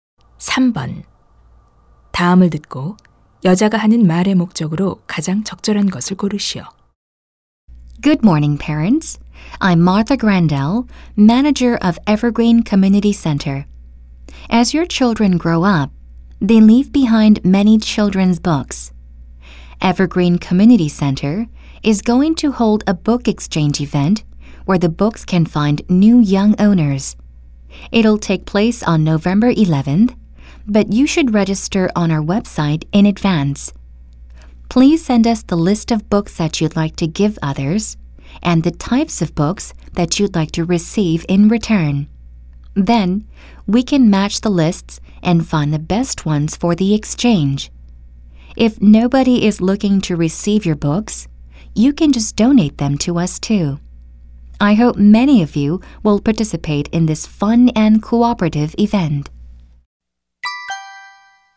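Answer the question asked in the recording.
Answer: 어린이 책 교환 행사를 알리고 참여를 독려하려고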